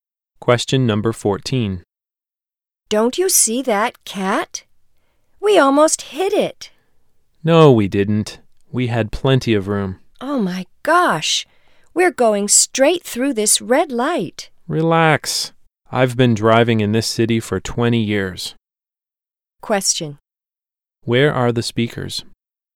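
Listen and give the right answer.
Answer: In a car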